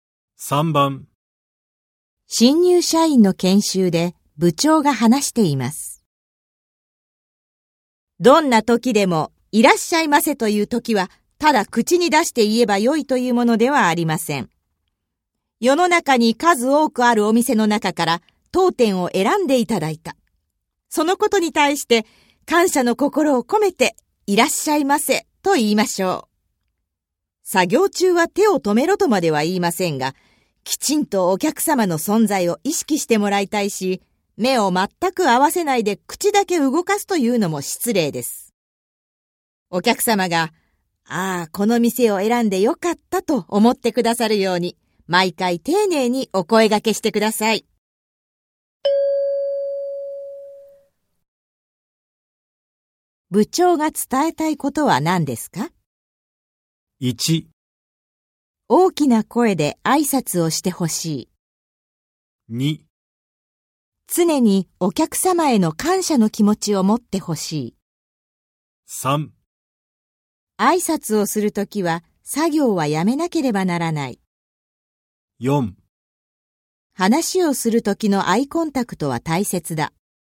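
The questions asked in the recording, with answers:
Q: 部長が伝えたいことは何ですか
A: 2: 常にお客様への感謝の気持ちを持ってほしい。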